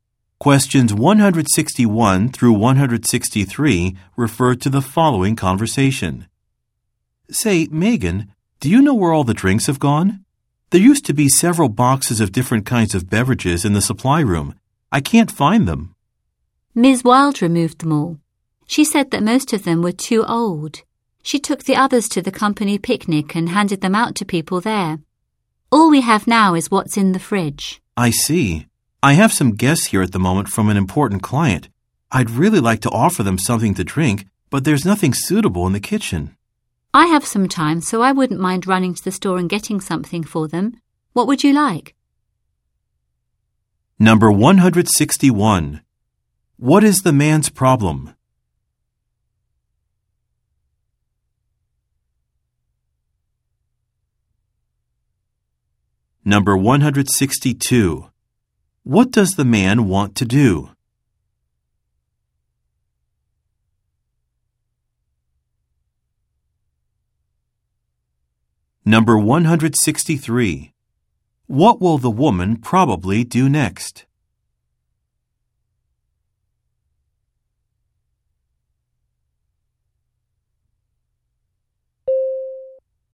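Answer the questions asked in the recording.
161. He can't find the drinks that were in the supply room.
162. Offer his guests something to drink.
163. Go to the store to buy drinks.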